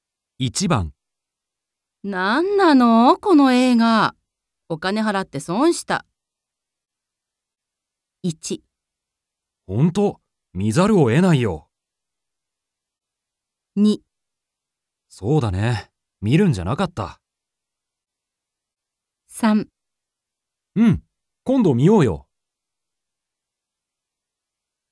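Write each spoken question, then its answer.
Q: 何なの、この映画。お金払って損した。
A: 2: そうだね、見るんじゃなかった。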